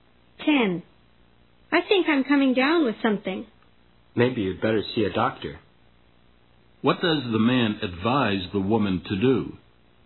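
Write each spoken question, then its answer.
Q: What does the man advise the woman to do?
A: See a doctor.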